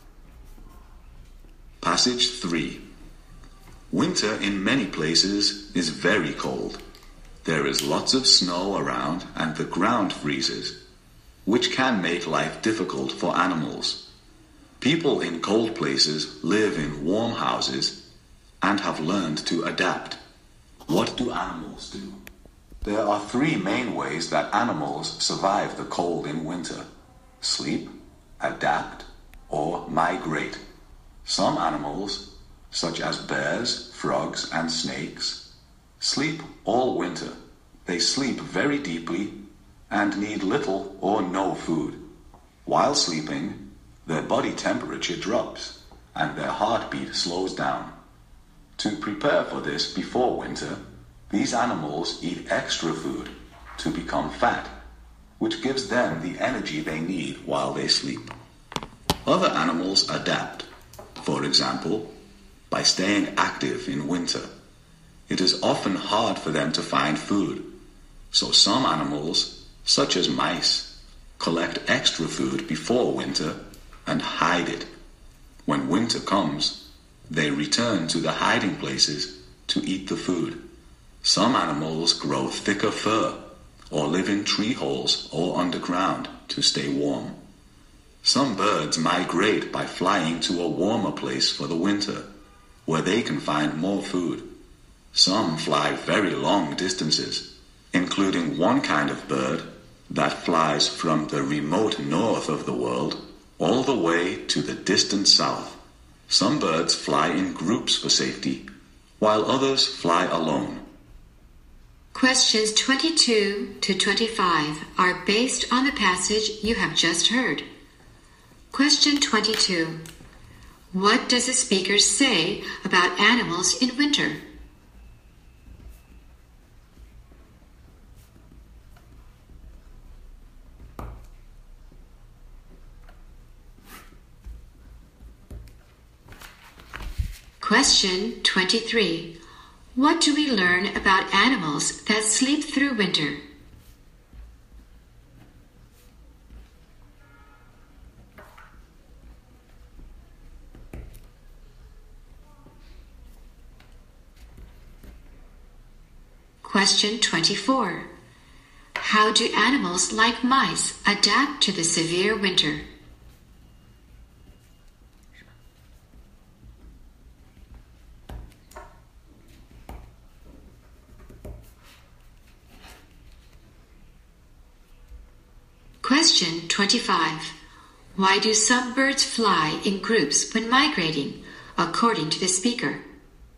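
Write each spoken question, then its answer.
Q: What does the speaker say about animals in winter?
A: They survive the cold in three main ways: sleep, adapt, or migrate.

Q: How do animals like mice adapt to the severe winter?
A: They collect extra food before winter and hide it.

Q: Why do some birds fly in groups when migrating, according to the speaker?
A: For safety.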